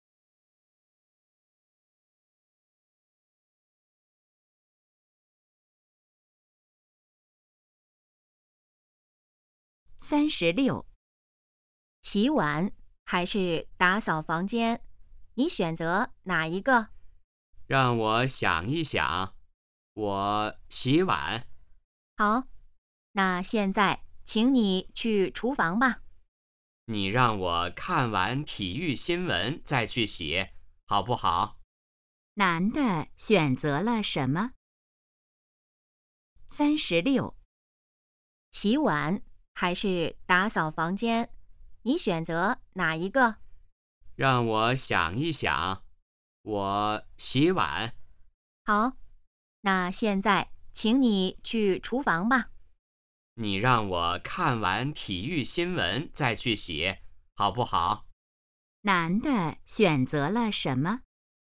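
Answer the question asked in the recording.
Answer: 洗碗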